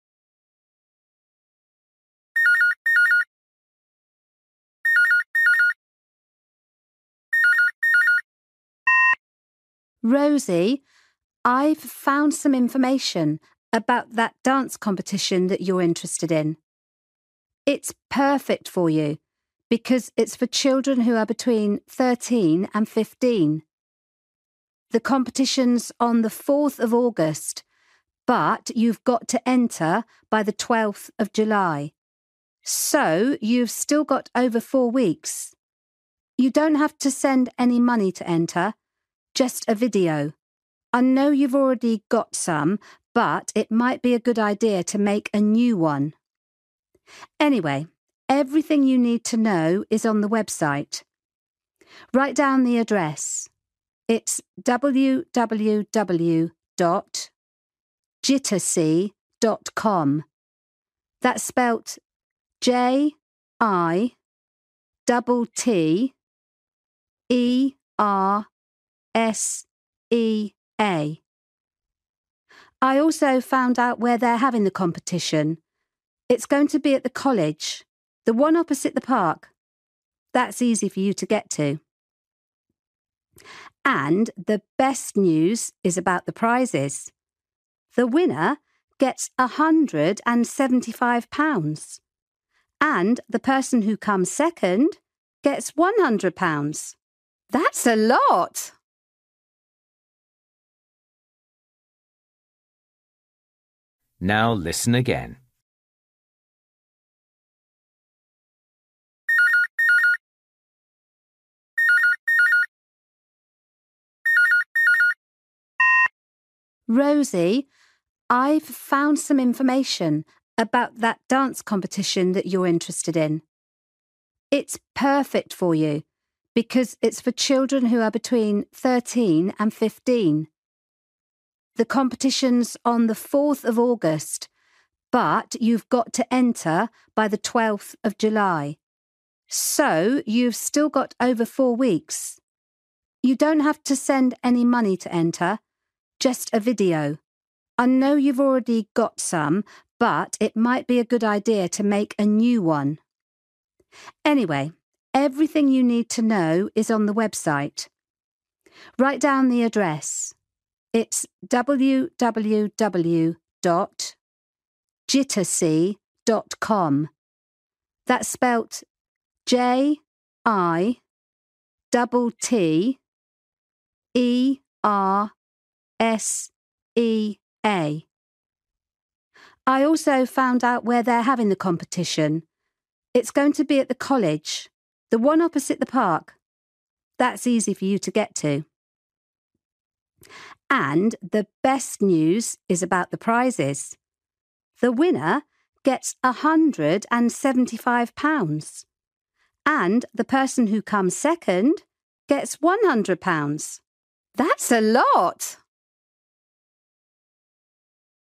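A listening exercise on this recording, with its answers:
For each question, write the correct answer in the gap. Write one word or a number or a date or a time.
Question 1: Date to enter by: (1)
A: 12th July

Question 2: Send: (2)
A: video

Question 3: Website address: (3) www. .com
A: jittersea

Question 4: Place: (4)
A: college

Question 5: First prize: (5) £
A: 175

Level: Luyện nghe trình độ A2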